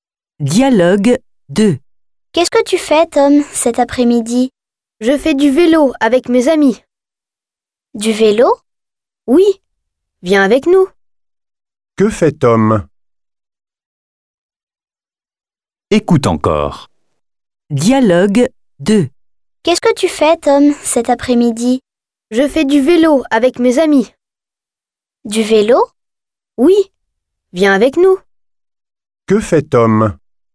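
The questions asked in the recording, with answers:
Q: Que fait Tom ?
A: Il fait du vélo avec ses amis.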